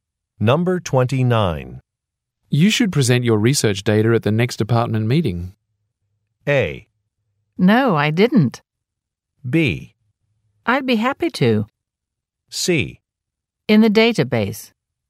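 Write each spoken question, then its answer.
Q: You should present your research data at the next department meeting.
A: B: I'd be happy to.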